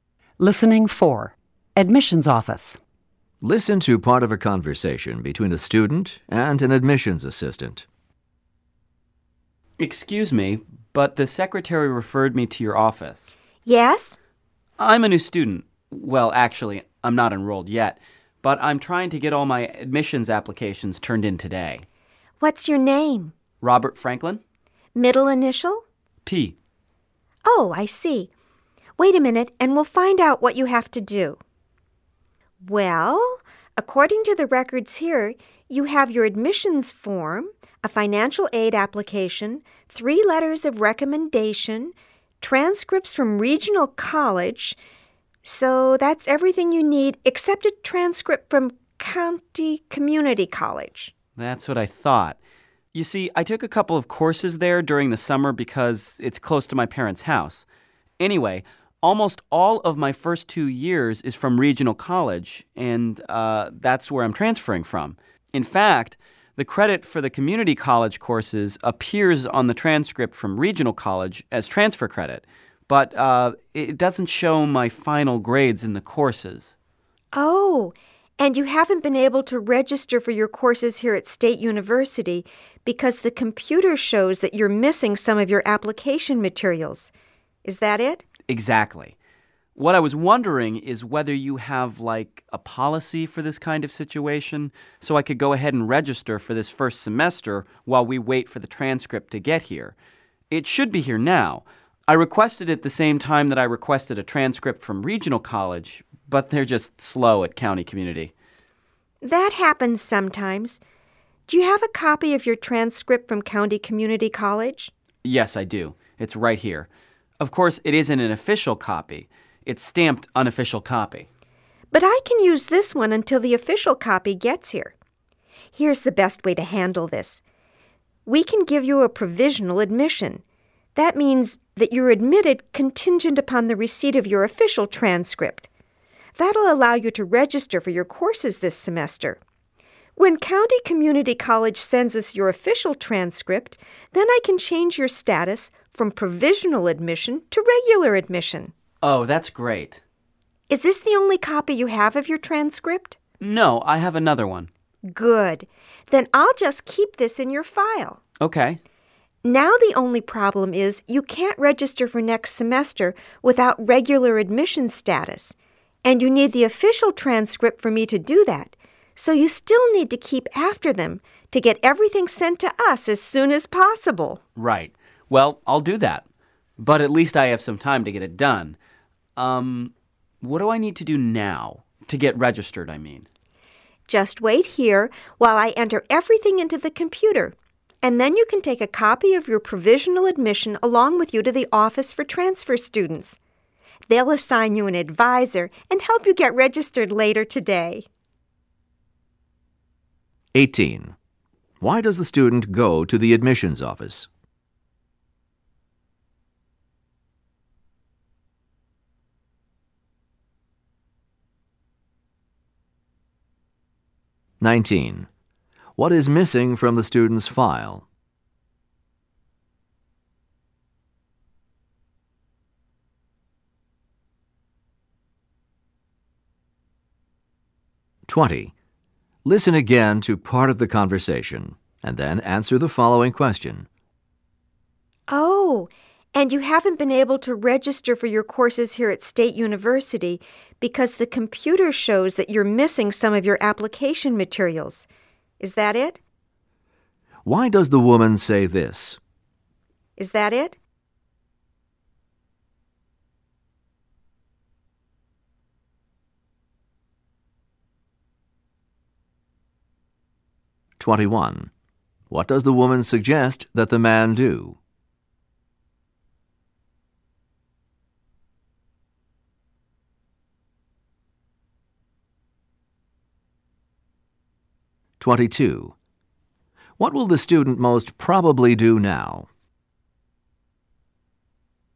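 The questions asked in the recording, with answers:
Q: Why does the student go to the admissions office?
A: To be able to register even though a transcript is missing from his application

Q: What is missing from the student's file?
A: The official transcript from County Community College

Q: What will the student most probably do now?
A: Wait for his provisional admission, then take it to the office for transfer students to register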